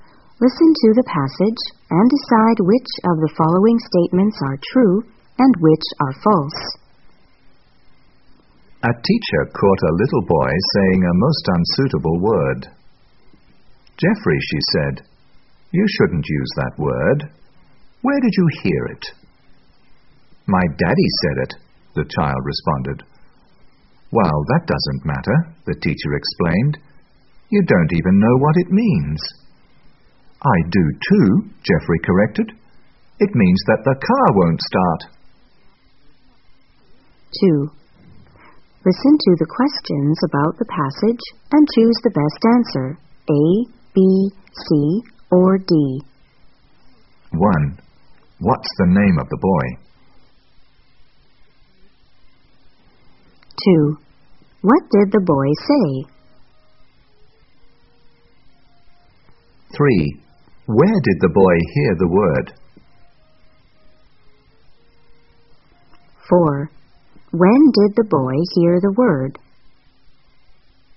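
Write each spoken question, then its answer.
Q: What's the name of the boy?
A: Jeffrey

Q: Where did the boy hear the word?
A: From his daddy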